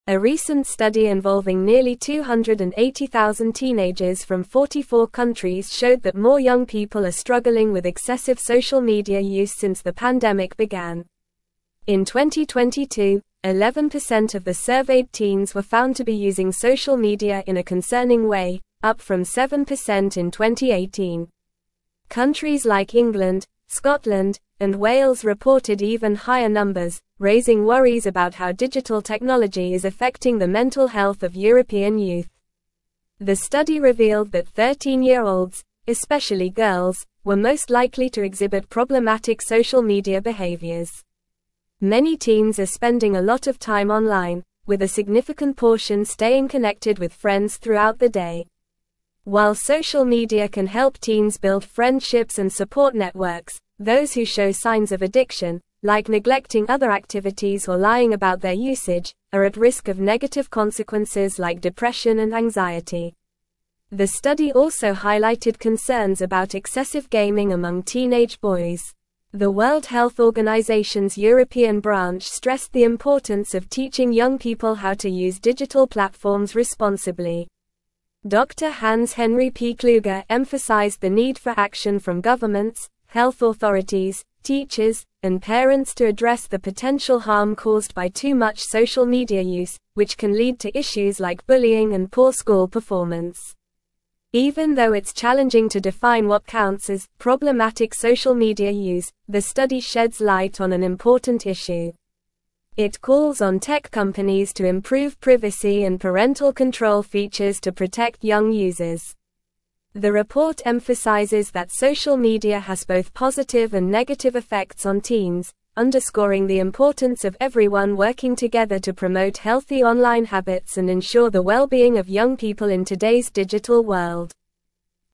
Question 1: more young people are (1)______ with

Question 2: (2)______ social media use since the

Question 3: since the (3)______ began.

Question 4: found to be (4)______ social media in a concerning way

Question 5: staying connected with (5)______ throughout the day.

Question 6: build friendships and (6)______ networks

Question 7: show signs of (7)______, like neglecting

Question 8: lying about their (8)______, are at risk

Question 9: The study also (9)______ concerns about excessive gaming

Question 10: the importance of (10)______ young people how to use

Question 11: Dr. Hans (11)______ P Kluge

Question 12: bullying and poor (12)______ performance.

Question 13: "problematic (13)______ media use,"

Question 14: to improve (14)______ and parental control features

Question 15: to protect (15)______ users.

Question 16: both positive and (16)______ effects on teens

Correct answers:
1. struggling
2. excessive
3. pandemic
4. using
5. friends
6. support
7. addiction
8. usage
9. highlighted
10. teaching
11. Henri
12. school
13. social
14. privacy
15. young
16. negative

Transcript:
A recent study involving nearly 280,000 teenagers from 44 countries showed that more young people are struggling with excessive social media use since the pandemic began. In 2022, 11% of the surveyed teens were found to be using social media in a concerning way, up from 7% in 2018. Countries like England, Scotland, and Wales reported even higher numbers, raising worries about how digital technology is affecting the mental health of European youth.
The study revealed that 13-year-olds, especially girls, were most likely to exhibit problematic social media behaviors. Many teens are spending a lot of time online, with a significant portion staying connected with friends throughout the day. While social media can help teens build friendships and support networks, those who show signs of addiction, like neglecting other activities or lying about their usage, are at risk of negative consequences like depression and anxiety.
The study also highlighted concerns about excessive gaming among teenage boys. The World Health Organization's European branch stressed the importance of teaching young people how to use digital platforms responsibly. Dr. Hans Henri P Kluge emphasized the need for action from governments, health authorities, teachers, and parents to address the potential harm caused by too much social media use, which can lead to issues like bullying and poor school performance.
Even though it's challenging to define what counts as "problematic social media use," the study sheds light on an important issue. It calls on tech companies to improve privacy and parental control features to protect young users. The report emphasizes that social media has both positive and negative effects on teens, underscoring the importance of everyone working together to promote healthy online habits and ensure the well-being of young people in today's digital world.

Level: Level 3